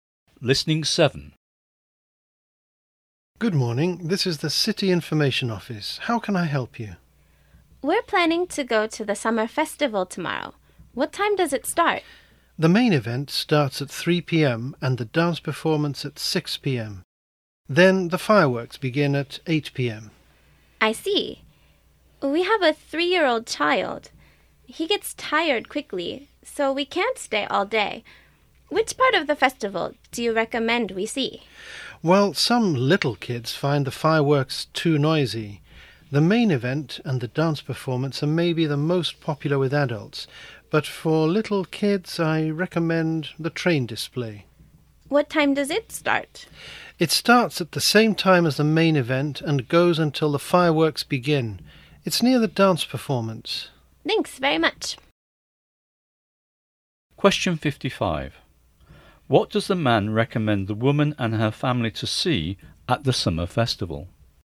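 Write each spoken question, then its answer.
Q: What does the man recommend the woman and her family to see at the summer festival?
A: The train display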